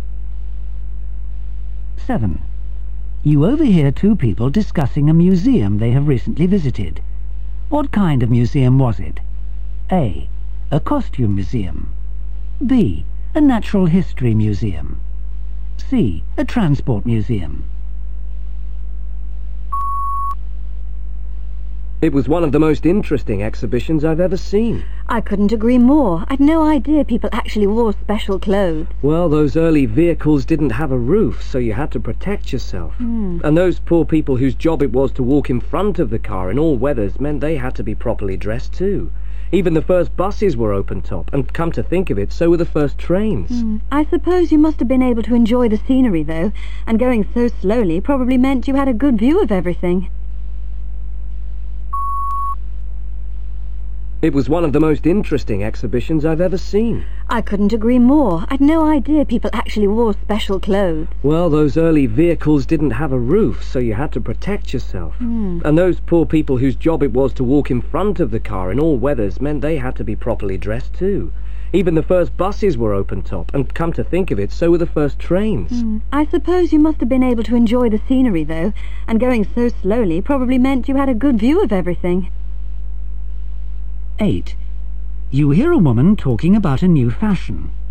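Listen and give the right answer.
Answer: C: A transport museum.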